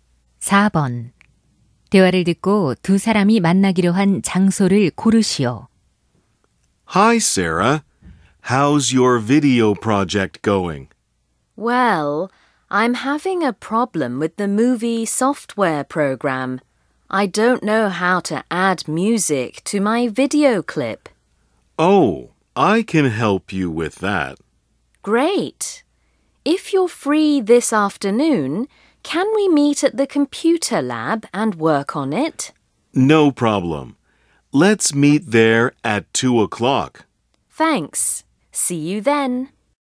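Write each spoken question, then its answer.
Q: 대화를 듣고 두 사람이 만나기로 한 장소를 고르시오.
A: 컴퓨터실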